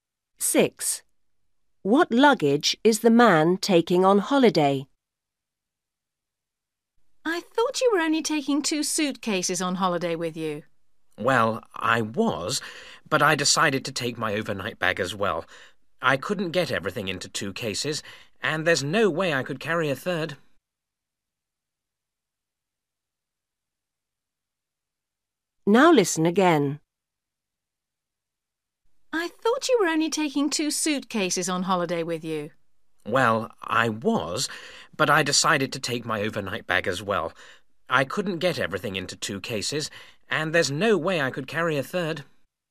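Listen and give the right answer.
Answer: Two suitcases and an overnight bag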